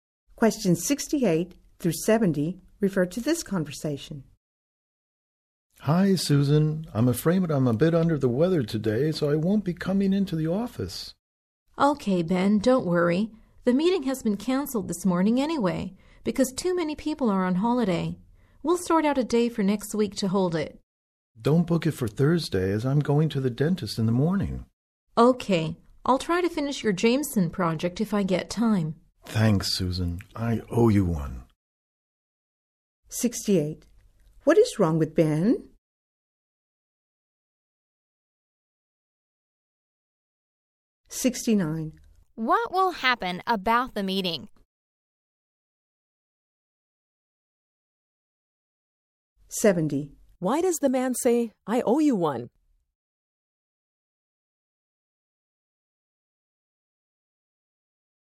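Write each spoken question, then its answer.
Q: What is wrong with Ben?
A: He is ill

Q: What will happen about the meeting?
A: It will be rescheduled for a day next week

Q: Why does the man say, I owe you one?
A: To thank Susan for finishing his project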